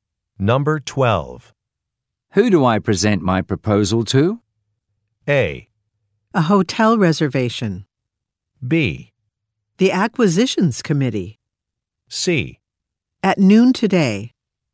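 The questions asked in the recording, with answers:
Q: Who do I present my proposal to?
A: B: The acquisitions committee.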